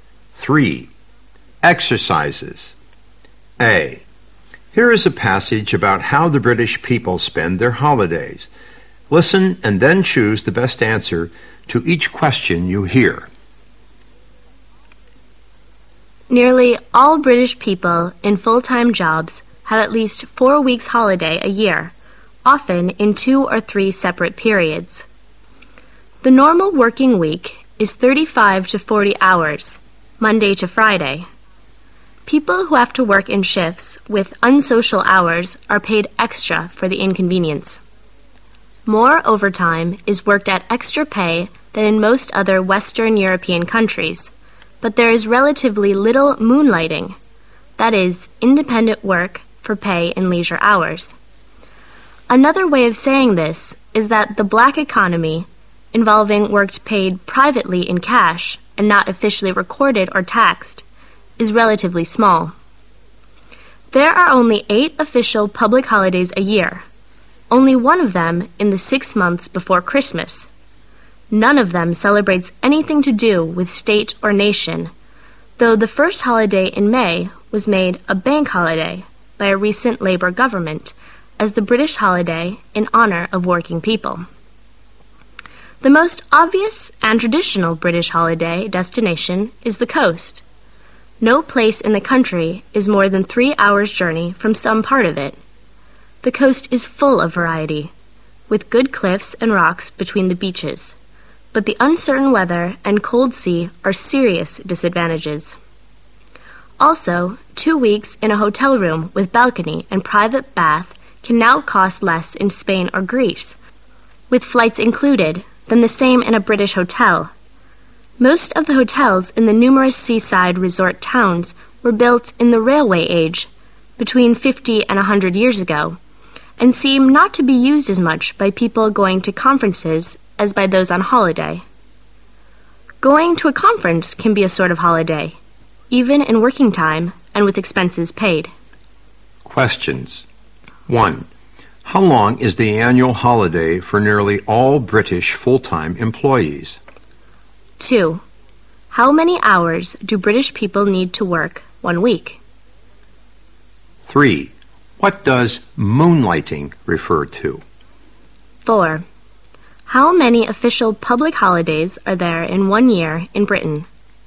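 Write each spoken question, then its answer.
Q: How long is the annual holiday for nearly all British full-time employees?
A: At least 4 weeks

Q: How many hours do British people need to work 1 week?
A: 35 to 40 hours

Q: What does moonlighting refer to?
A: Independent work for pay in leisure hours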